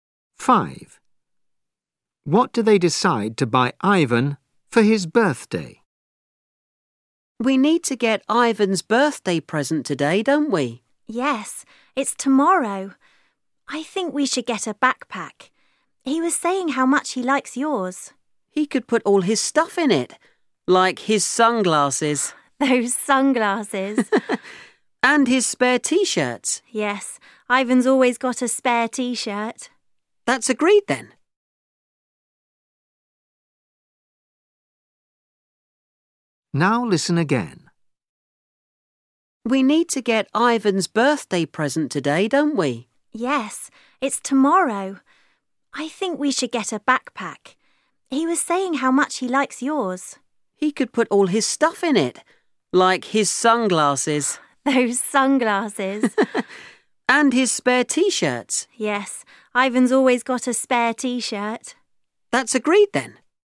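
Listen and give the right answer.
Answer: a backpack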